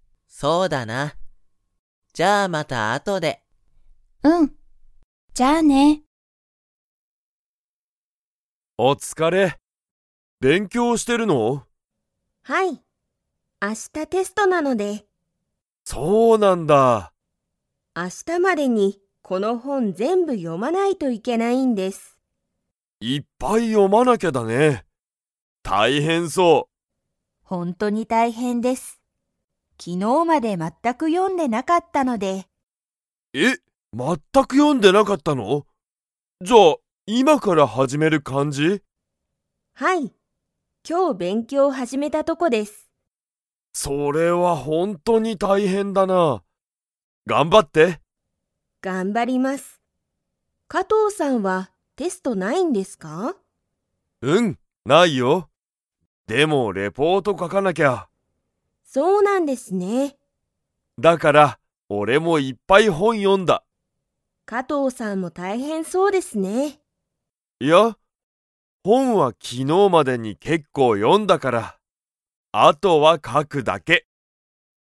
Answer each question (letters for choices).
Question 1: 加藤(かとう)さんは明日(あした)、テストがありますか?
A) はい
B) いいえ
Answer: B

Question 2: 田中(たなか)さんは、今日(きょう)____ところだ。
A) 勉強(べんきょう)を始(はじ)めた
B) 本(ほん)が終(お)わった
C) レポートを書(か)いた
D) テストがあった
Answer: A

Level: Level 2